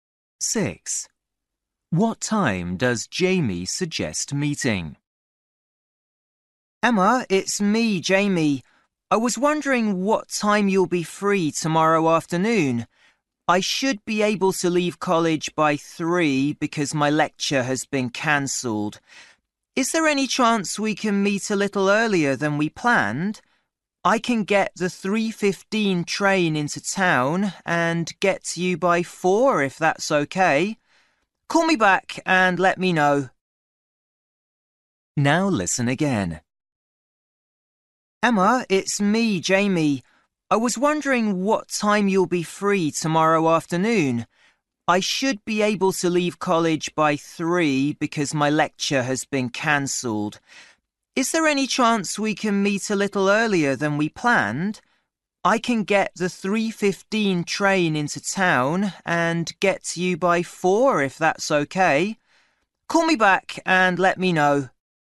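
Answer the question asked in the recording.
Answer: At 4 o'clock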